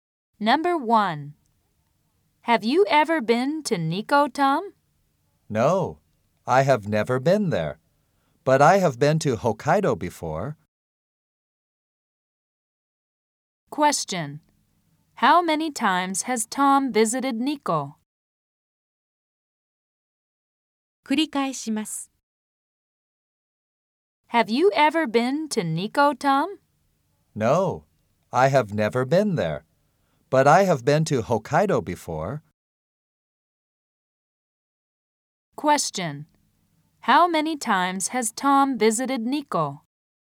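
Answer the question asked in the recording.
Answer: He has never visited Nikko.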